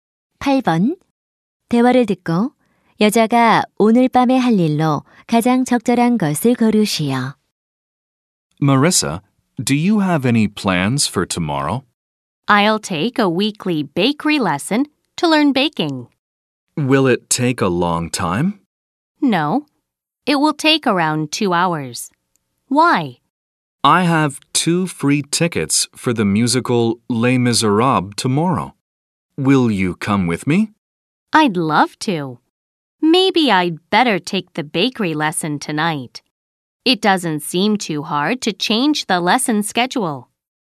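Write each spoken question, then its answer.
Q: 대화를 듣고 여자가 오늘 밤에 할 일로 가장 적절한 것을 고르시오.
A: 제빵 수업 듣기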